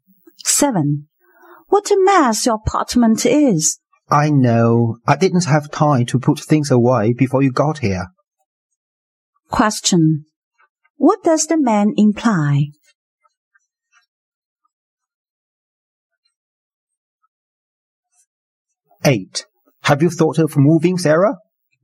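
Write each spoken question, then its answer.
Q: What does the man imply?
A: He had no time to tidy up his apartment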